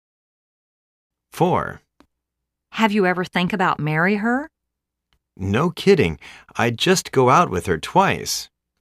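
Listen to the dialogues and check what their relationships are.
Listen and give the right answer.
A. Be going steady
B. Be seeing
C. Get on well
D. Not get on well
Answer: B. Be seeing

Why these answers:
A:Have you ever think about marry her? B:No kiddingl I just go out with her twice!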